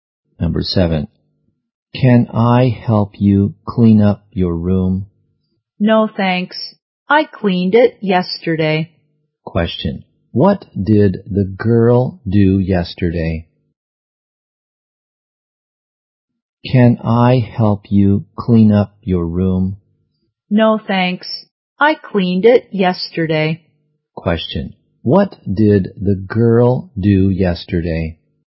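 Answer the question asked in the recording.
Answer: She cleaned her room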